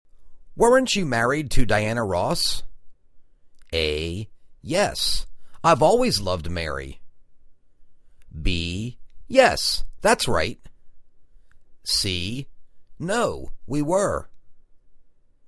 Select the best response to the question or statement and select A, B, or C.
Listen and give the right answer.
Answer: Yes, that's right.